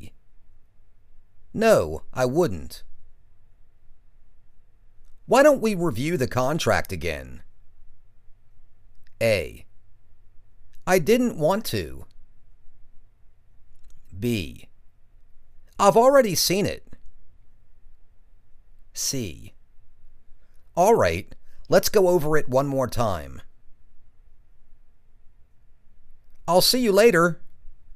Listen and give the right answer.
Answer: All right. Let's go over it one more time.